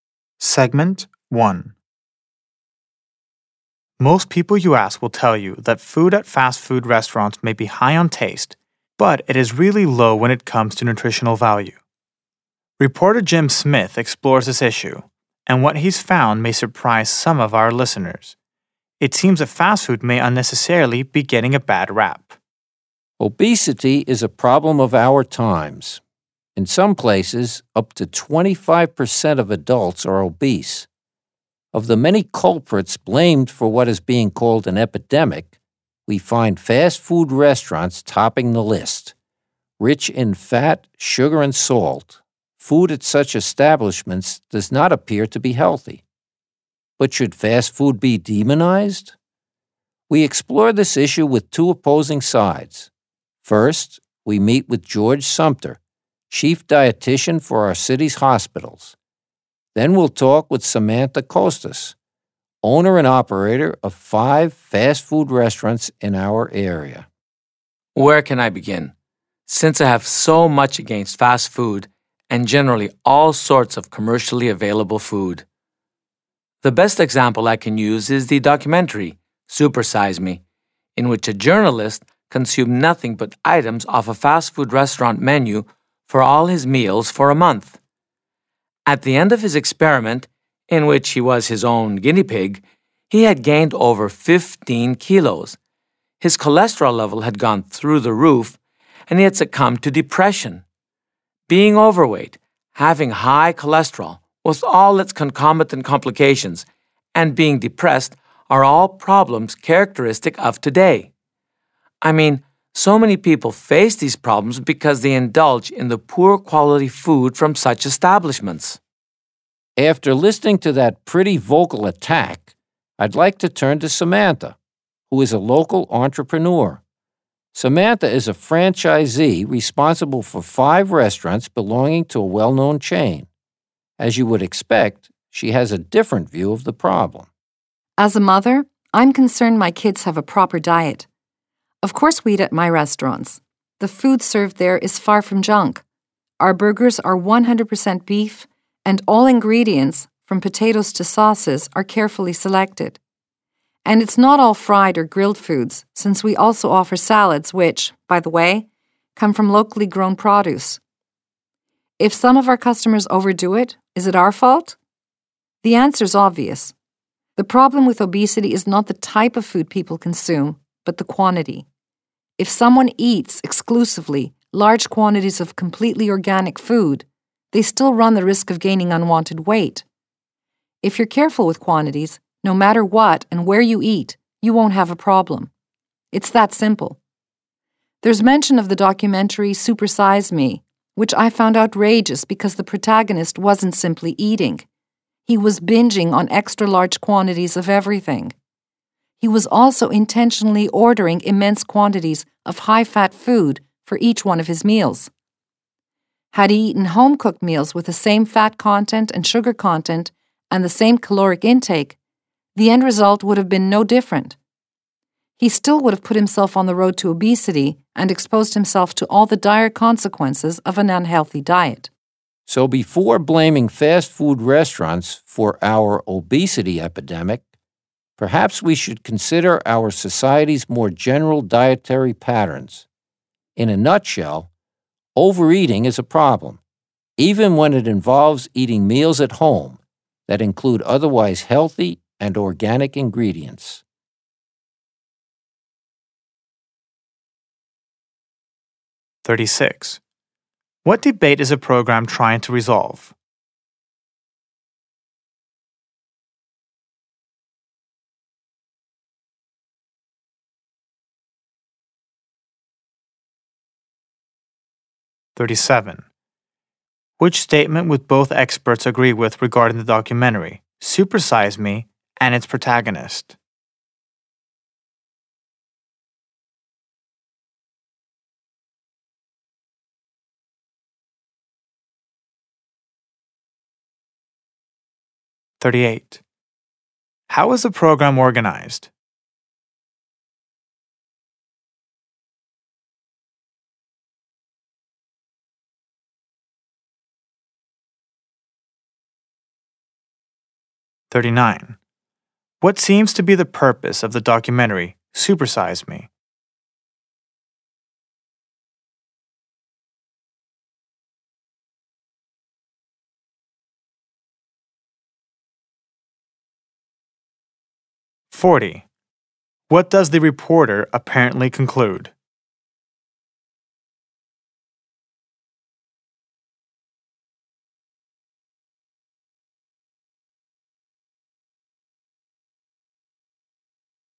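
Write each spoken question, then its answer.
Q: What debate is a program trying to resolve?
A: Whether fast food is to blame for obesity

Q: How is the program organized?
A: An introduction followed by two experts with opposing views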